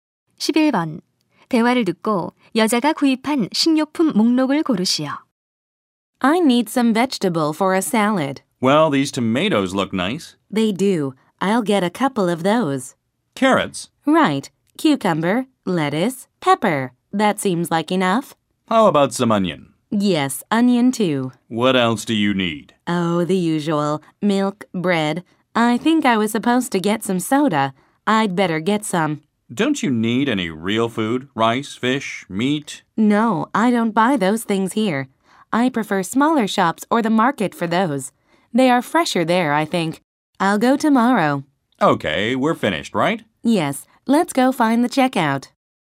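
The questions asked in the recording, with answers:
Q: 대화를 듣고 여자가 구입한 식료품 목록을 고르시오.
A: 토마토, 당근, 오이, 상추, 피망, 양파, 우유, 빵, 탄산음료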